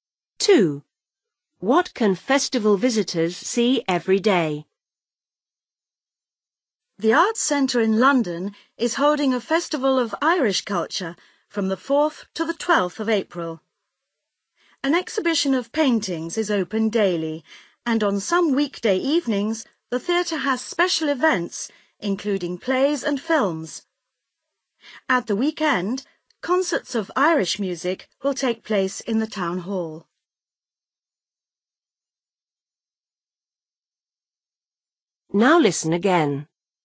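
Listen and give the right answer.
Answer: an exhibition of paintings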